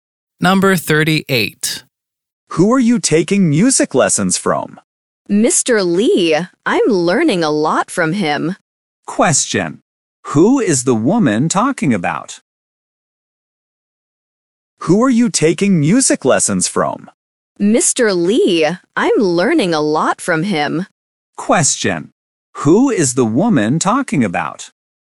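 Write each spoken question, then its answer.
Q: Who is the woman talking about?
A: Her music teacher, Mr. Lee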